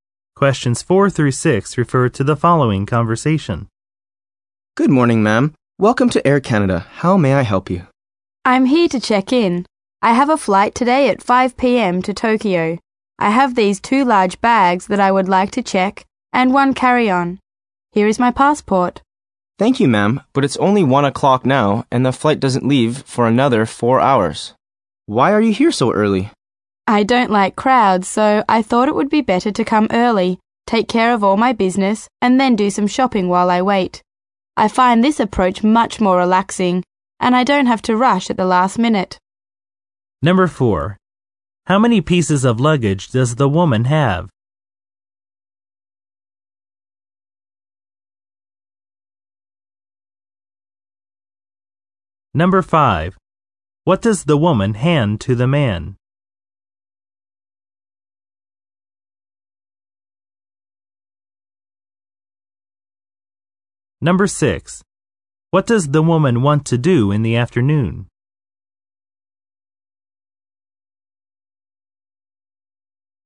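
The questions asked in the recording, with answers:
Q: How many pieces of luggage does the woman have?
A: Three

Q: What does the woman hand to the man?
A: Her passport

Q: What does the woman want to do in the afternoon?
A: Go shopping while she waits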